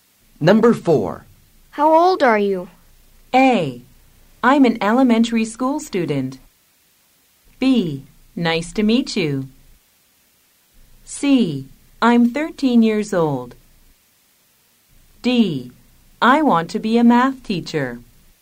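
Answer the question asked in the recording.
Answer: C: I'm 13 years old.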